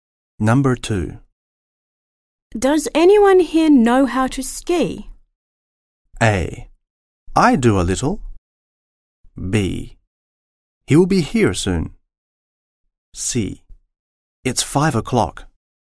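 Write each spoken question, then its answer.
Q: Does anyone here know how to ski?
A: A: I do a little.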